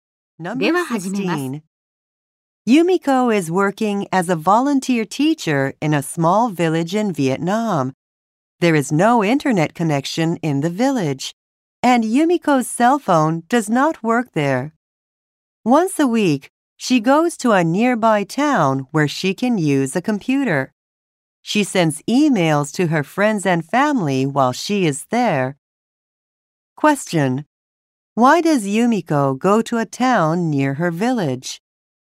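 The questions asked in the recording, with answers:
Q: Why does Yumiko go to a town near her village?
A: To use a computer to send emails.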